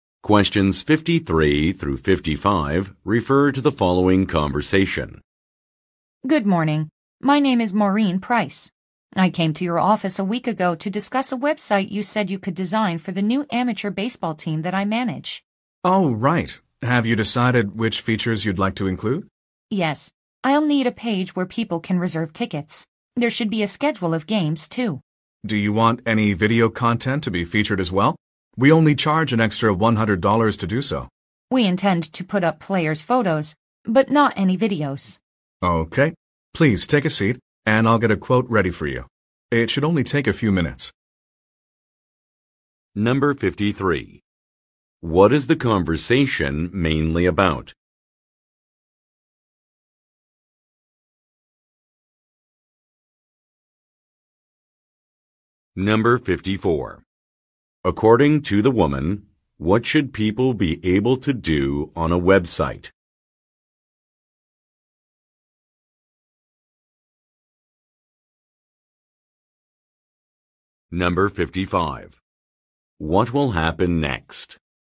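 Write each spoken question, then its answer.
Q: What is the conversation mainly about?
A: Designing a website for an amateur baseball team

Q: According to the woman, what should people be able to do on a website?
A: Reserve tickets

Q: What will happen next?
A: The man will prepare a price quote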